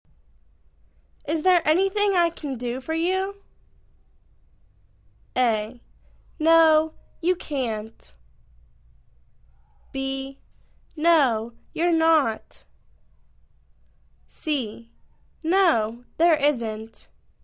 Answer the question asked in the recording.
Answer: No, there isn't.